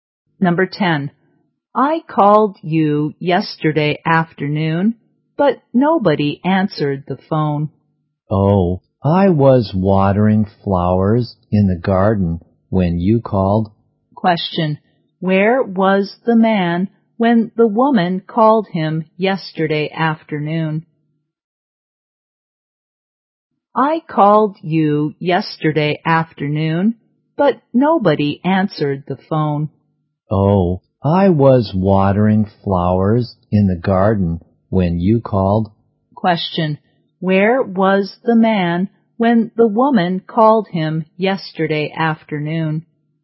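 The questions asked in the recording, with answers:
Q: where was the man when the woman called him yesterday afternoon?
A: In the garden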